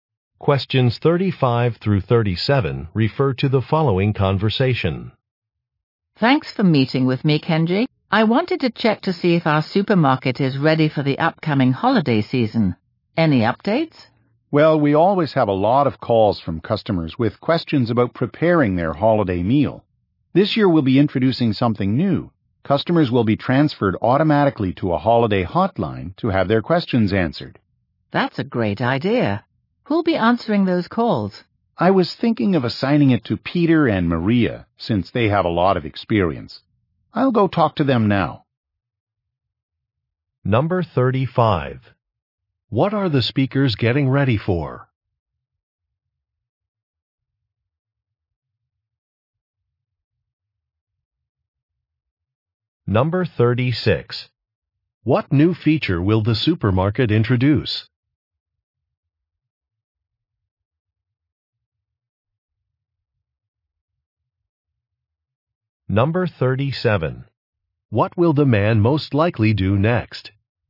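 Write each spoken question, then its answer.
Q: What are the speakers getting ready for?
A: The holiday season

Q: What new feature will the supermarket introduce?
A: A holiday hotline for customer questions

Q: What will the man most likely do next?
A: Talk to Peter and Maria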